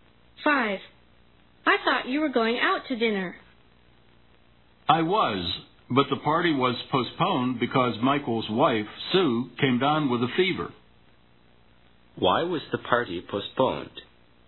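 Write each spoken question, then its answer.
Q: Why was the party postponed?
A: Michael's wife Sue had a fever.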